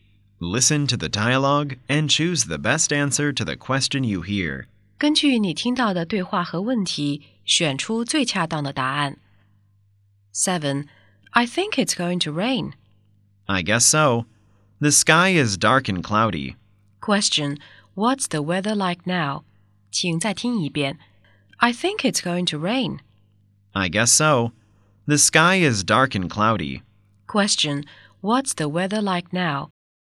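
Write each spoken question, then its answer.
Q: what's the weather like now?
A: It's dark and cloudy.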